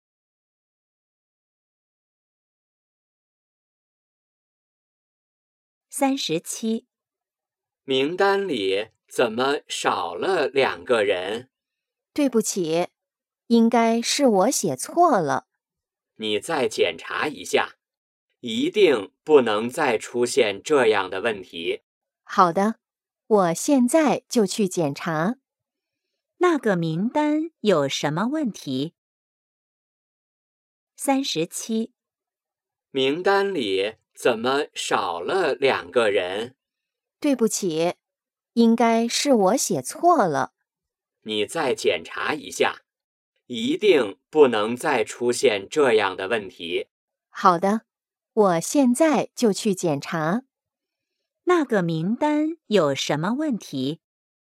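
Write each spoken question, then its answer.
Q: 那个名单有什么问题?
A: 少了两个人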